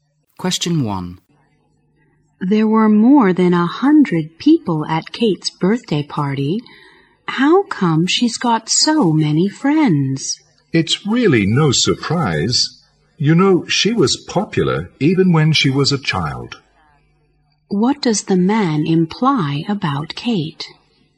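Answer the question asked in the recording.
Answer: She has always been popular.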